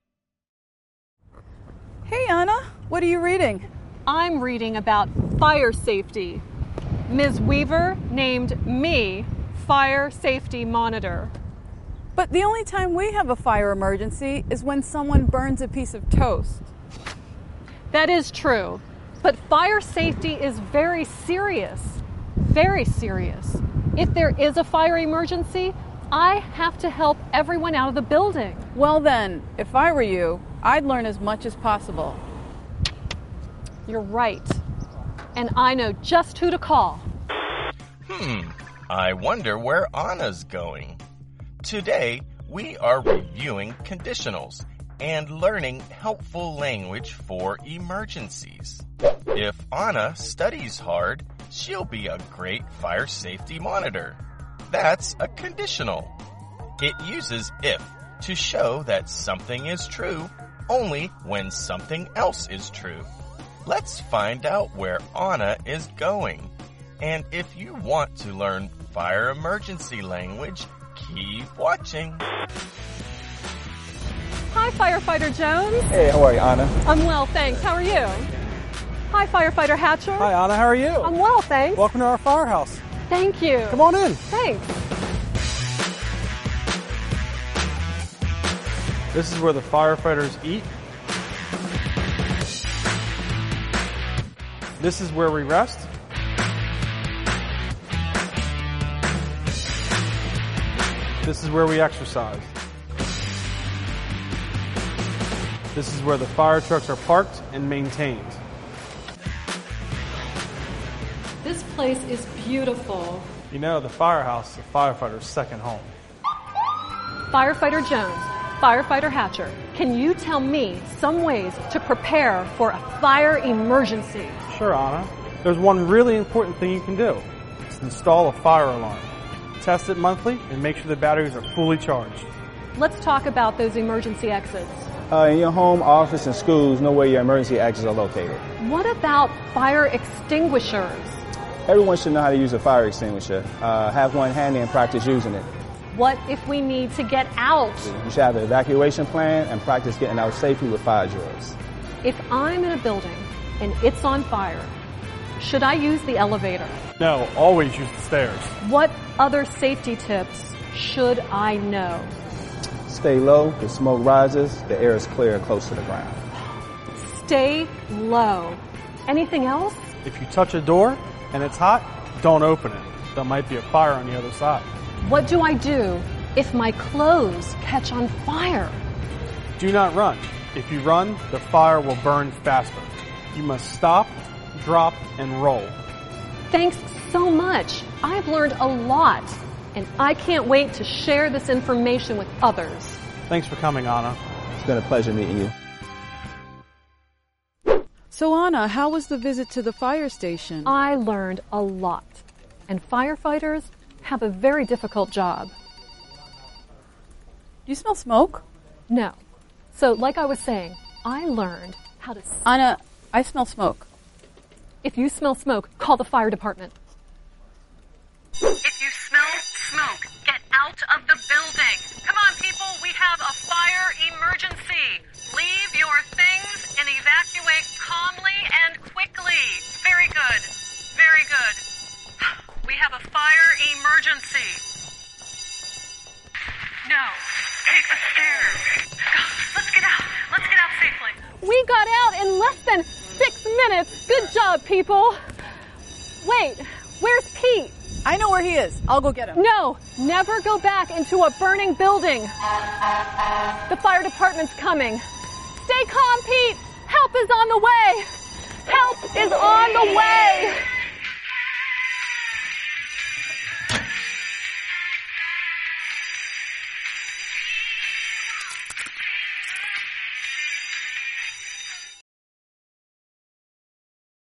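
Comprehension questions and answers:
Test yourself on what you learned!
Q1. What do we call a person who fights fires?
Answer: A firefighter

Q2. What's the name of the place where this person lives and works?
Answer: A firehouse (fire station)

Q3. What are some things you can do to prepare for a fire?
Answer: Install a fire alarm, know where the emergency exits are, have a fire extinguisher handy, have an evacuation plan and practise fire drills

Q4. What do we call practicing safely leaving a building?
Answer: A fire drill

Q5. If you smell smoke, what should you do?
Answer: Call the fire department and get out of the building

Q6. If your clothes catch on fire, what do you do?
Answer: Stop, drop and roll

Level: Let's Learn English Level 2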